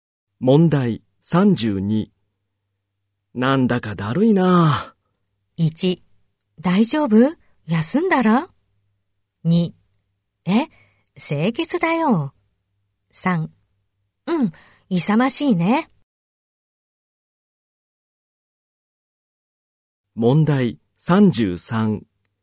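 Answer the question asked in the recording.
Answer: 1: 大丈夫?休んだら?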